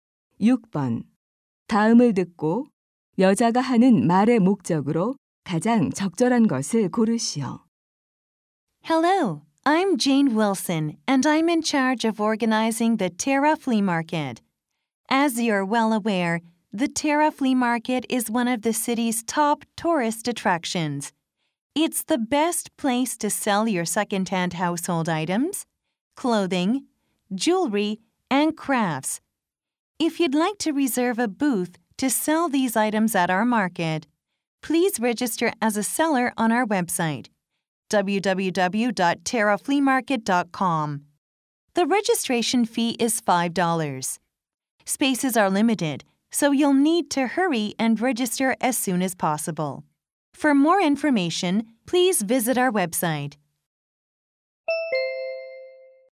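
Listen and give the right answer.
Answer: 벼룩시장 판매자 등록을 독려하려고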